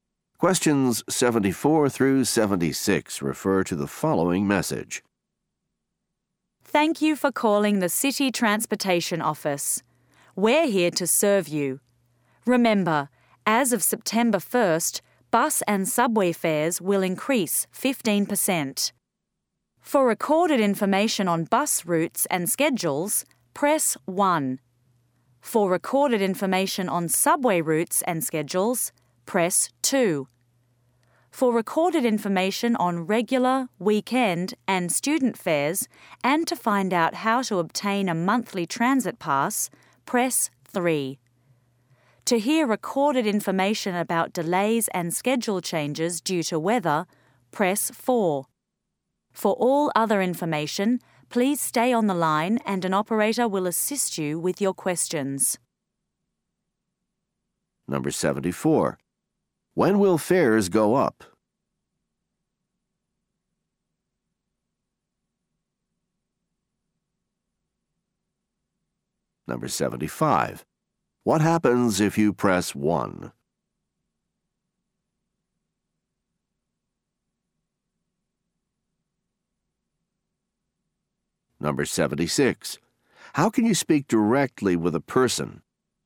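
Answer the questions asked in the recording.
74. September 1st
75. You hear bus route and schedule information
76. Stay on the line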